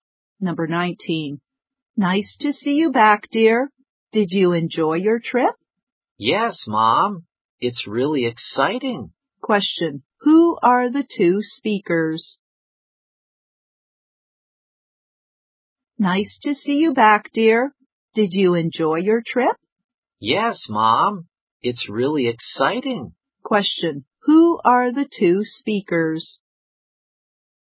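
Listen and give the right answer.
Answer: Mother and child (son or daughter)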